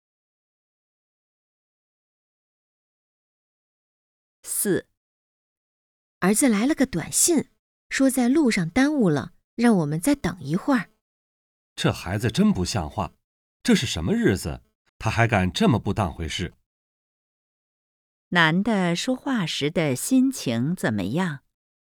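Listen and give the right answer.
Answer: 生气,不满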